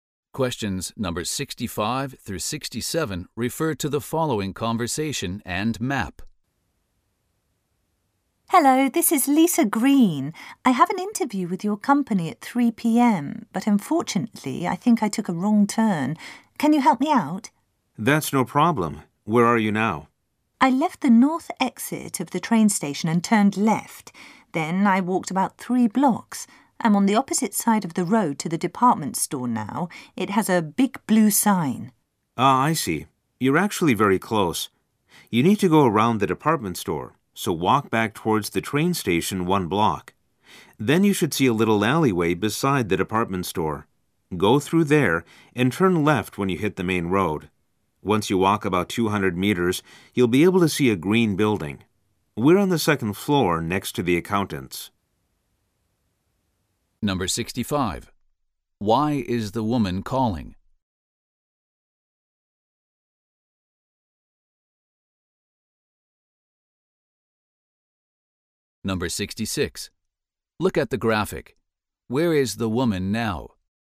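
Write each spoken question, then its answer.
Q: Why is the woman calling?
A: She took a wrong turn on the way to her interview and needs directions

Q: Where is the man's office?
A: On the 2nd floor of a green building, next to the accountants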